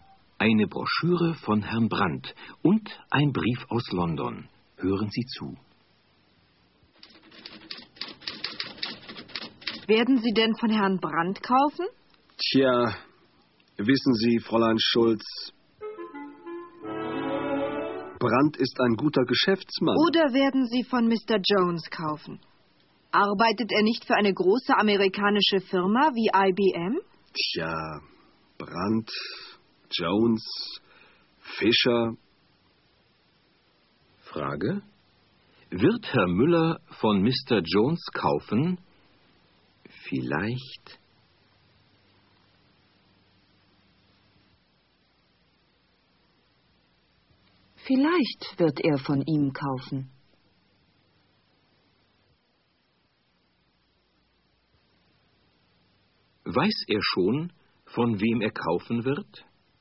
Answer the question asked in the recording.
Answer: Nein, er weiß noch nicht, von wem er kaufen wird.